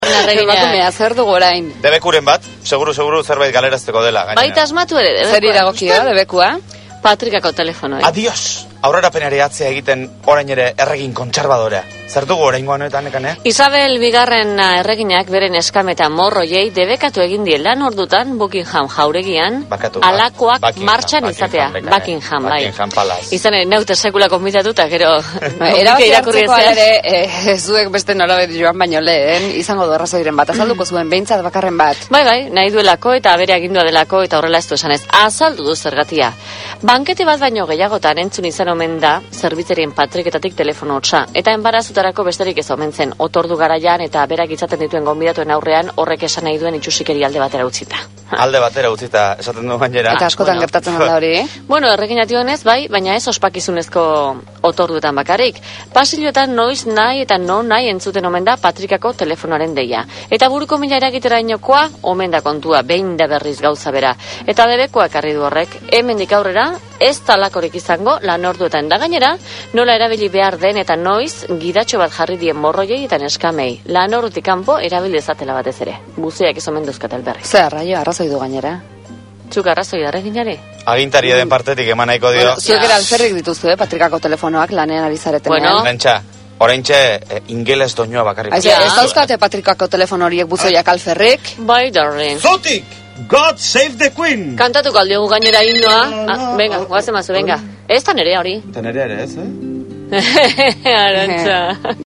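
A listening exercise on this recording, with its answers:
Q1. Nor da berriaren protagonista? ¿Quién es el protagonista de la noticia?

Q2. Zer gertatu da? ¿Qué ha ocurrido?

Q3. Nori debekatu dio? ¿A quién le ha prohibido?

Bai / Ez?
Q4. Gutxitan entzuten zen telefonoa? ¿Se oía pocas veces el teléfono?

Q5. Buruko mina sortzen zion erreginari? ¿Le producía dolor de cabeza a la reina?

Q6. Arazoa otorduetan bakarrik gertatzen zen? ¿El problema era sólo a la hora de las comidas?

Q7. Gidatxo bat sortu dute zerbitzarientzat? ¿Han creado una guía para los sirvientes?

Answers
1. Britania Handiko Isabel II erregina
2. Patrikako telefonoak debekatu egin ditu Buckinham Palace-n
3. Zerbitzariei
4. Ez
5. Bai
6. Ez
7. Bai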